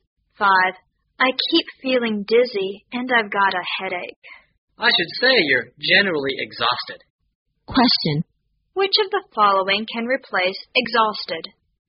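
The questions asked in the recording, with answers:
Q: Which of the following can replace exhausted?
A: Very tired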